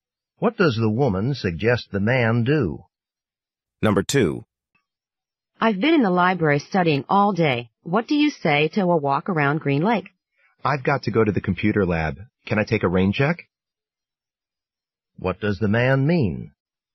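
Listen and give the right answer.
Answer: He can't go for a walk now, but would like to go another time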